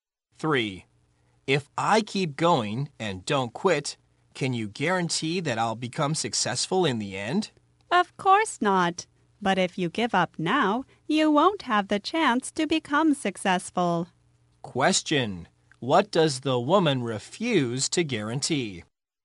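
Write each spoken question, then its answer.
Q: What does the woman refuse to guarantee?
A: That he will become successful in the end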